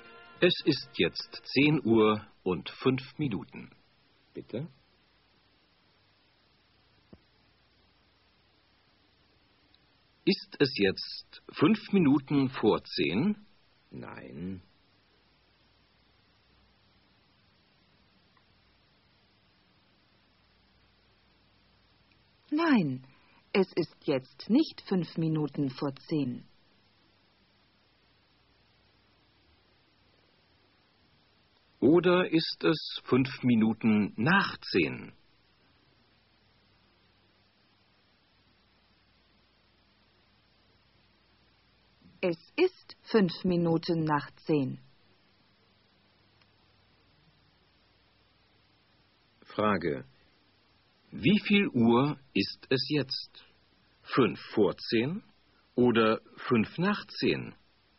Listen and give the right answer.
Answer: Es ist jetzt 5 nach 10.